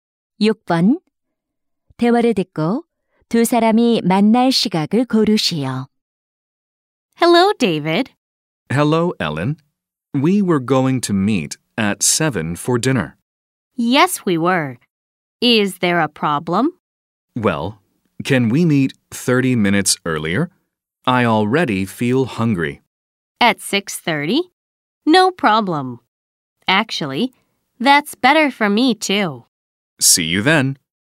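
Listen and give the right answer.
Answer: 6시 30분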